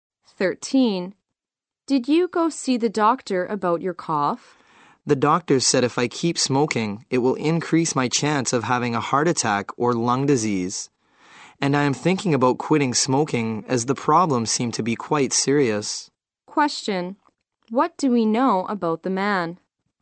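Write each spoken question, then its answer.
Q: What do we know about the man?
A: He is thinking about quitting smoking.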